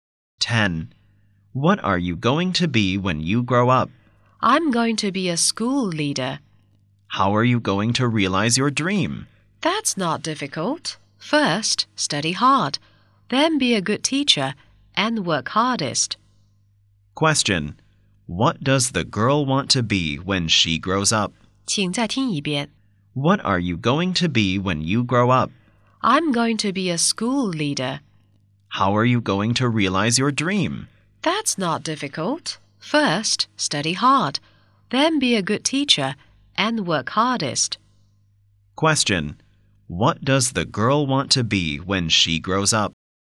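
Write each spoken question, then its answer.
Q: What does the girl want to be when she grows up?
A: A school leader.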